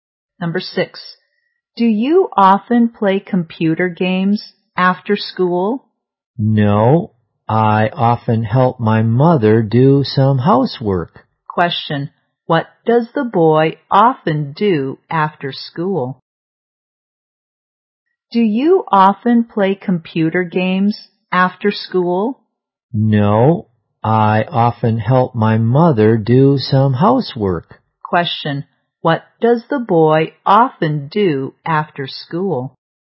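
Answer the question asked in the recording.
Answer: He helps his mother do some housework.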